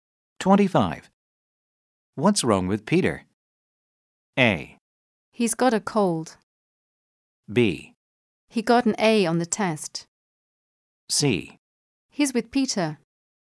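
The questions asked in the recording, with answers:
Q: What's wrong with Peter?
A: A: He's got a cold.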